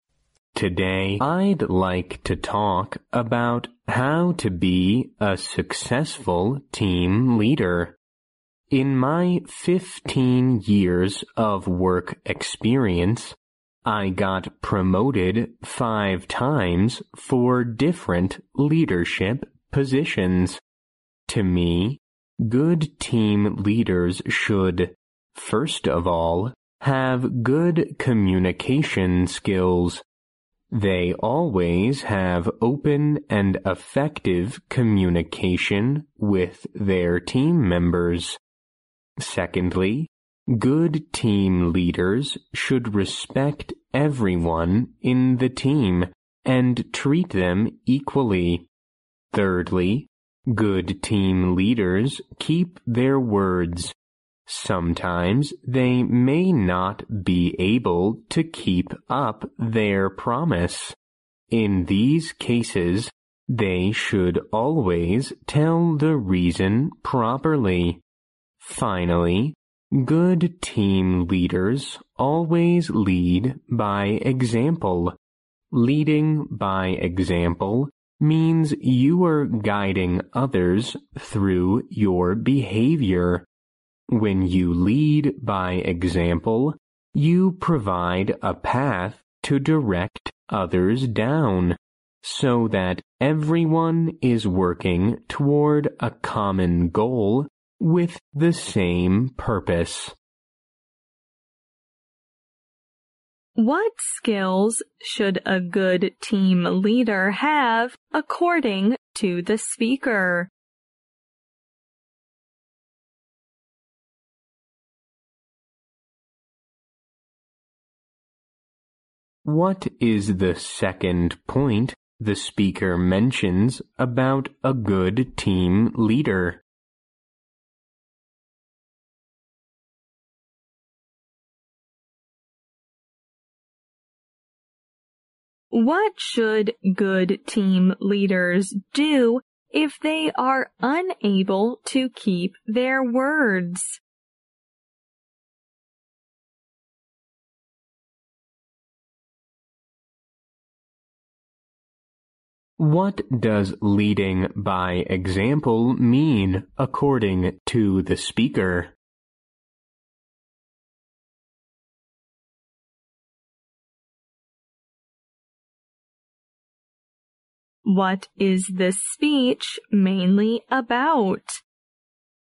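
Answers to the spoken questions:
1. Good communication skills
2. They should respect everyone in the team and treat them equally
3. Always tell the reason properly
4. Guiding others through your behavior
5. How to be a successful team leader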